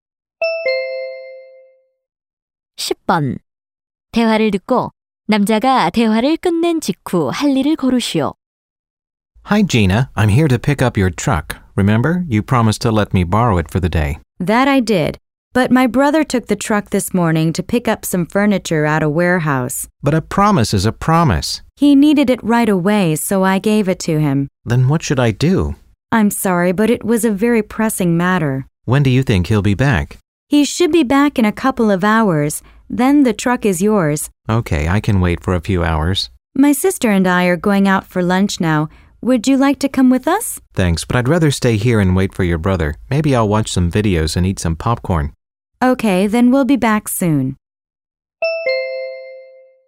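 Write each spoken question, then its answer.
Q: 대화를 듣고 남자가 대화를 끝낸 직후 할 일을 고르시오.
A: 비디오를 보며 트럭을 기다리기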